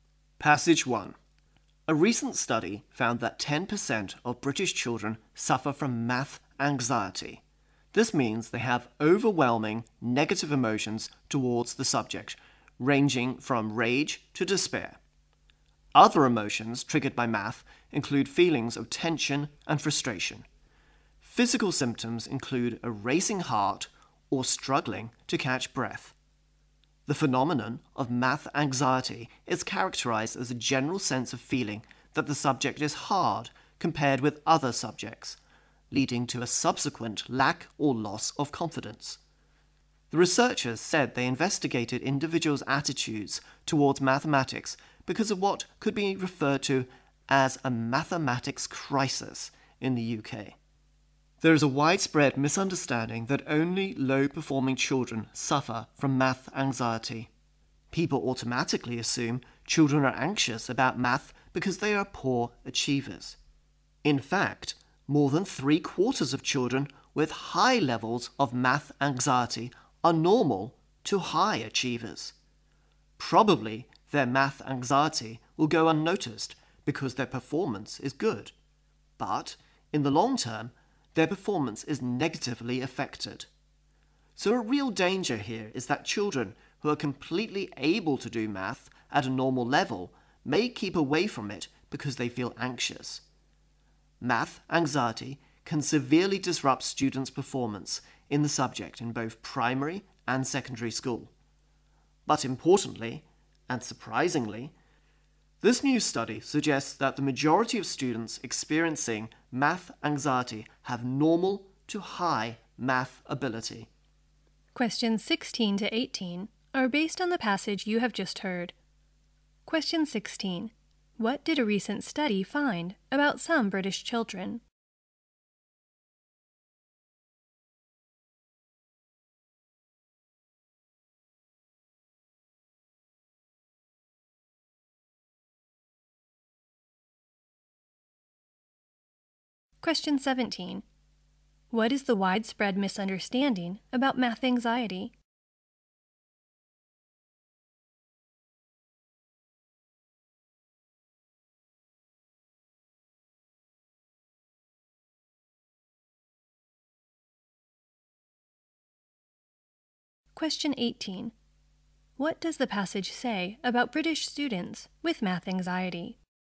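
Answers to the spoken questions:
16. 10% suffer from math anxiety
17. That only low-performing children suffer from it
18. Most of them have normal to high math ability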